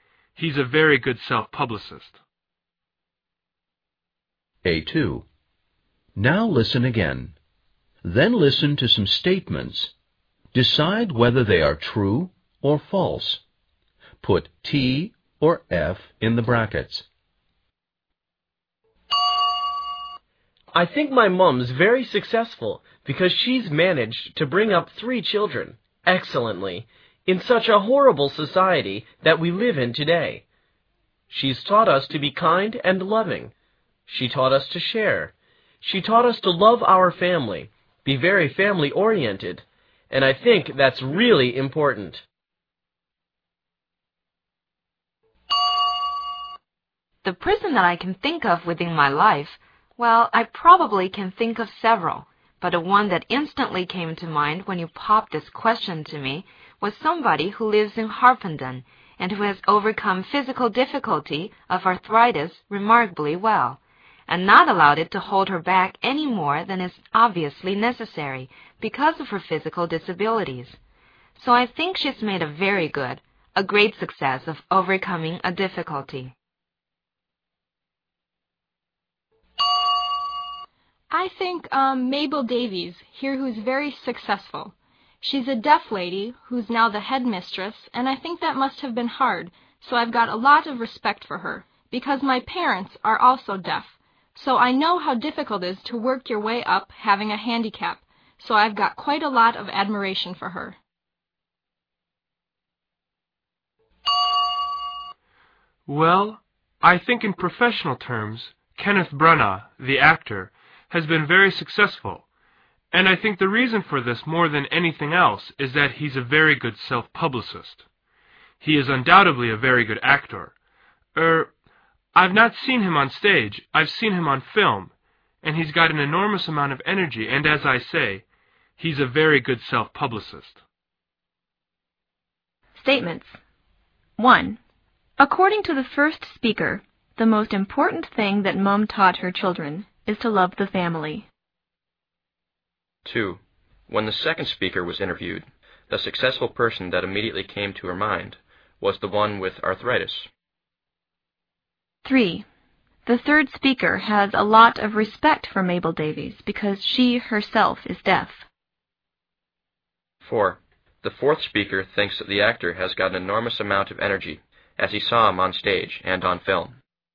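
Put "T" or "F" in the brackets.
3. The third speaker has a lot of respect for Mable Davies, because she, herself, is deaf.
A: F

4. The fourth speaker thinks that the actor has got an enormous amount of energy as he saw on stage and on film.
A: F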